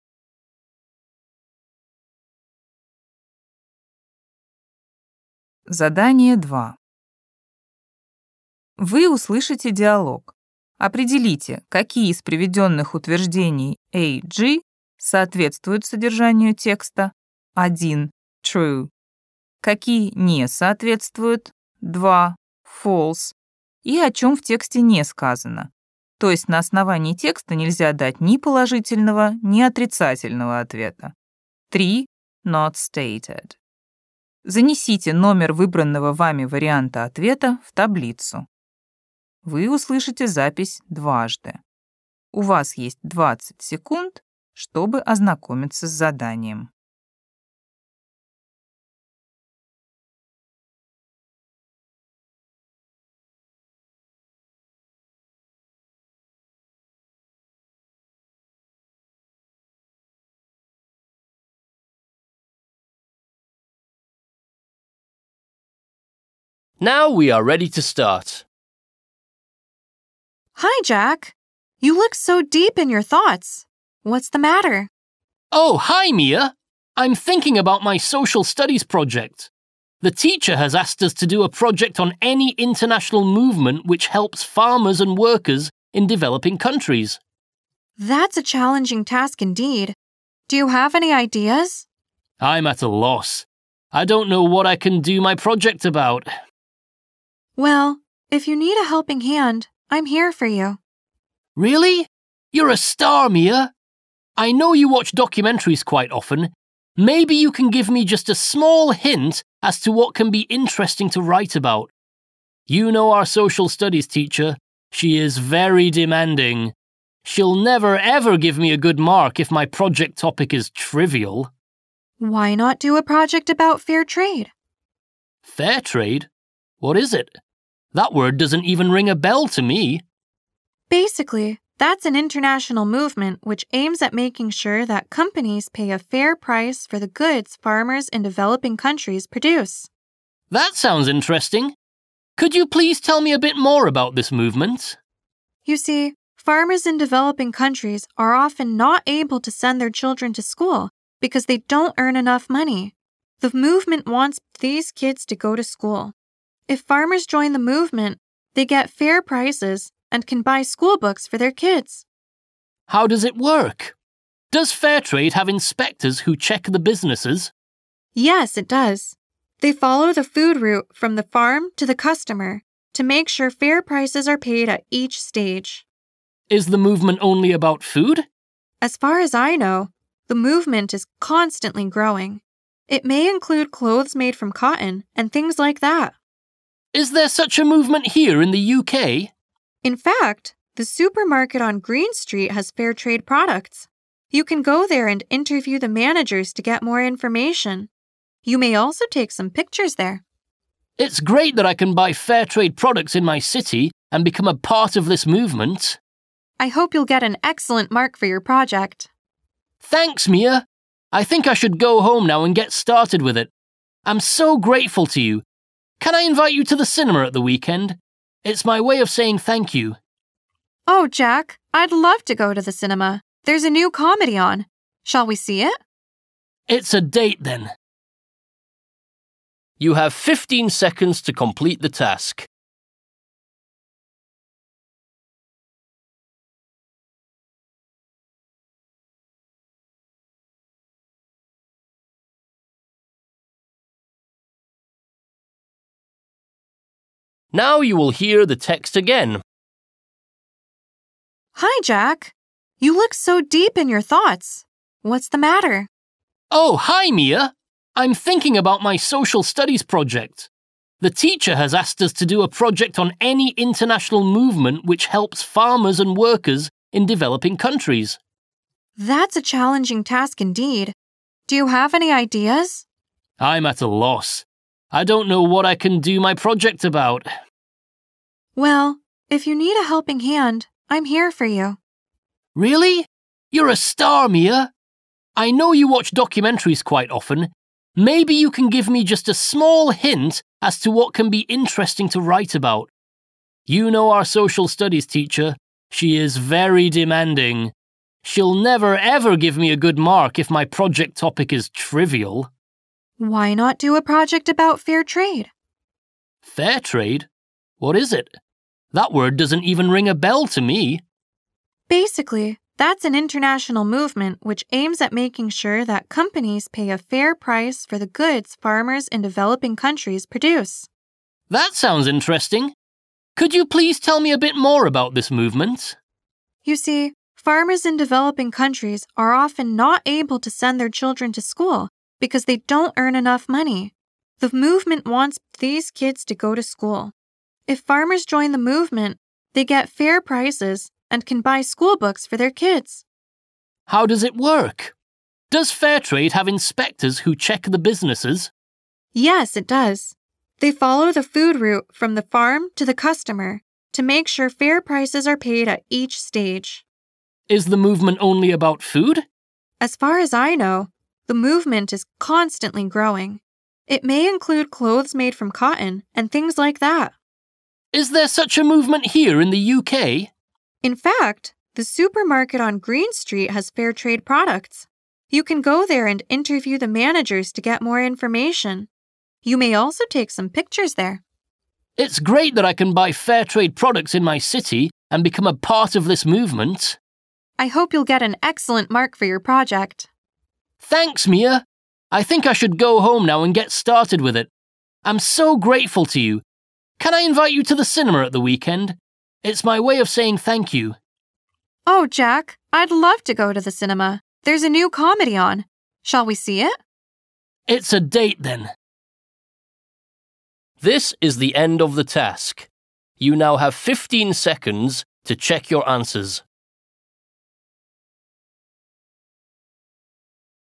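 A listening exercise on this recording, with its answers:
Вы услышите диалог. Определите, какие из приведённых утверждений А-G соответствуют содержанию текста (1 - True), какие не соответствуют (2 - False) и о чём в тексте не сказано, то есть на основании текста нельзя дать ни положительного, ни отрицательного ответа (3 - Not stated). Запишите ответ последовательностью из 7 цифр. Вы услышите запись дважды.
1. Jack has a task on Social Studies.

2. Jack is bad at Social Studies.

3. Jack's Social Studies teacher isn't strict.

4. Jack has heard about Fairtrade before.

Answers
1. True
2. Not stated
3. False
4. False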